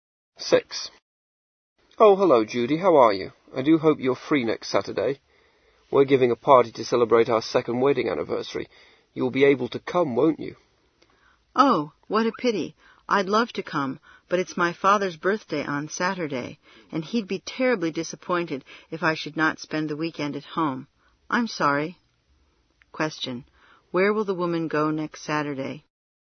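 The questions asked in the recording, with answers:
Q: Where will the woman go next Saturday?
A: Home, for her father's birthday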